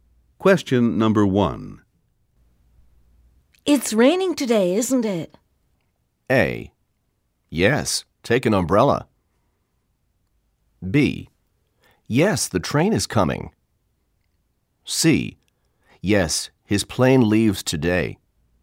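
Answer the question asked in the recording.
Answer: A: Yes, take an umbrella.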